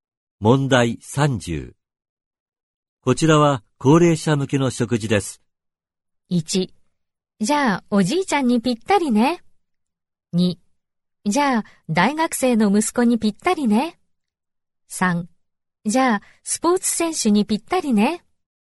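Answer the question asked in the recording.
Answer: 1: じゃあおじいちゃんにぴったりね。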